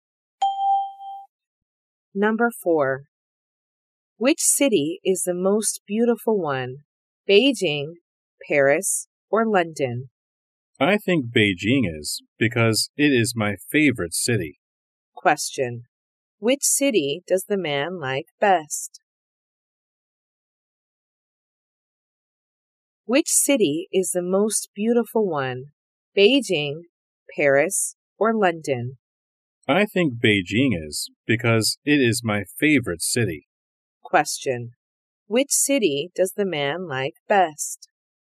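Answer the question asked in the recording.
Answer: Beijing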